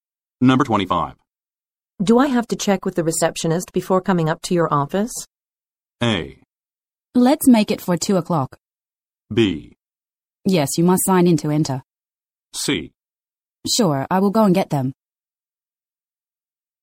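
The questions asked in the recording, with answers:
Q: Do I have to check with the receptionist before coming up to your office?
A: B: Yes, you must sign in to enter.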